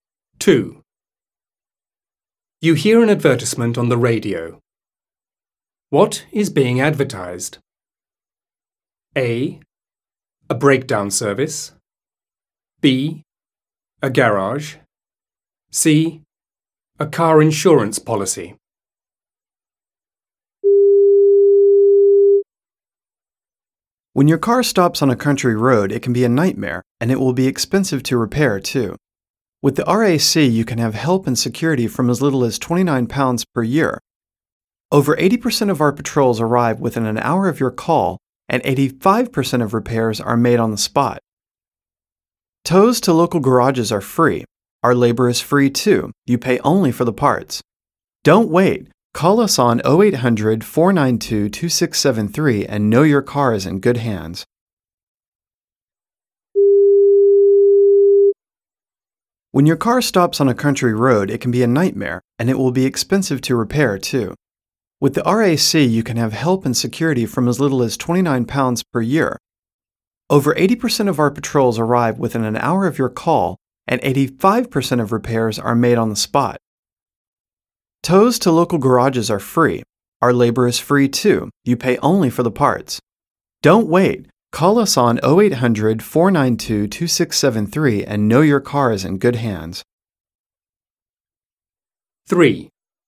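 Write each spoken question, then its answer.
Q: What is being advertised?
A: A: A breakdown service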